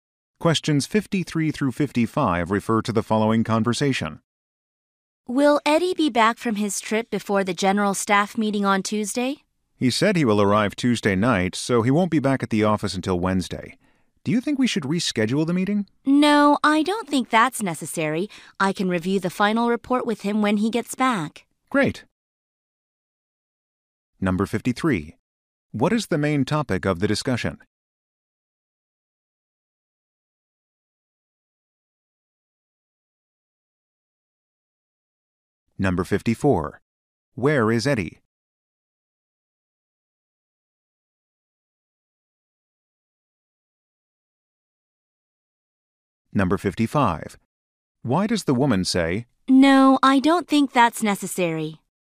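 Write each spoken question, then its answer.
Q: What is the main topic of the discussion?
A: Whether Eddie will be back for the staff meeting

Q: Where is Eddie?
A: On a trip

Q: Why does the woman say,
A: She thinks the meeting need not be rescheduled; she can review the report with Eddie later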